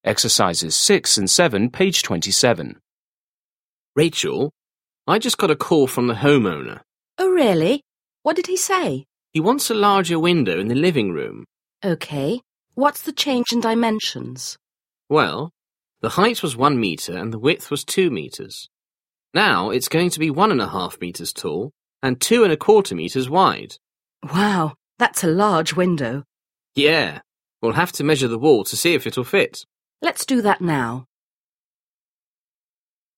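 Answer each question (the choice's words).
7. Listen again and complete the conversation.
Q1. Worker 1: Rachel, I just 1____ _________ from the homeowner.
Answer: got a call

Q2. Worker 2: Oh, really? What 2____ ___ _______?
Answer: did he say

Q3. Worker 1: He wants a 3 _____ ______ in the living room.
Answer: larger window

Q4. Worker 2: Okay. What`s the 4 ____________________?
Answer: change in dimensions

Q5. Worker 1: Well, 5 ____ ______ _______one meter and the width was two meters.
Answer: the height was

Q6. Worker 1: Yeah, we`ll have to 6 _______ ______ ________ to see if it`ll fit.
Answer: measure the wall

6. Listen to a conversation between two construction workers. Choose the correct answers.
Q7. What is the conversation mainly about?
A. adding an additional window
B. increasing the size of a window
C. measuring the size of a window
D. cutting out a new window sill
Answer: increasing the size of a window

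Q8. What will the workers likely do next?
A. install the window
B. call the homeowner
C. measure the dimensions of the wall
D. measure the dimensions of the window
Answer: measure the dimensions of the wall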